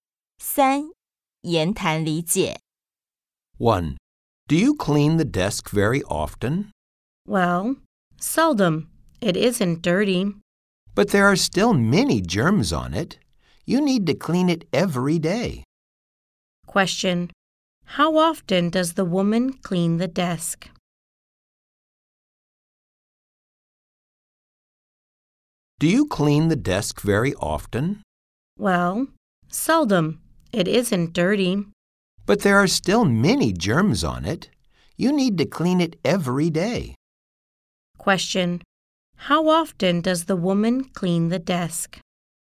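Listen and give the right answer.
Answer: Seldom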